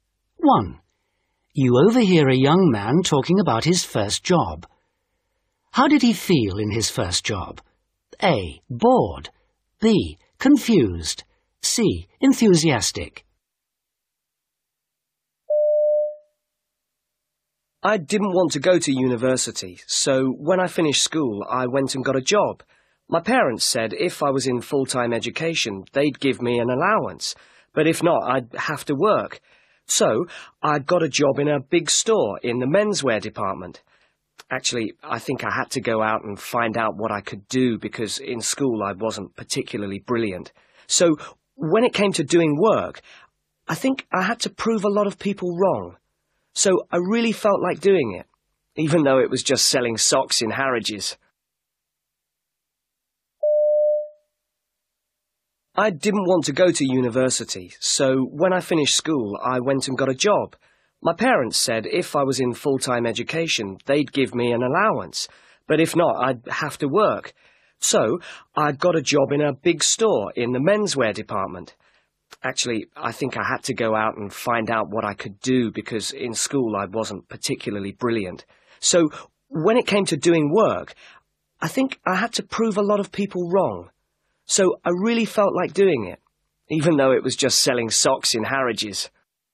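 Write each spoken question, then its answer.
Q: How did he feel in his first job?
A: C: Enthusiastic.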